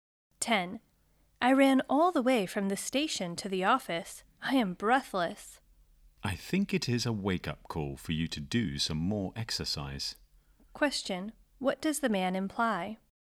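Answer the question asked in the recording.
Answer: The woman should do more exercise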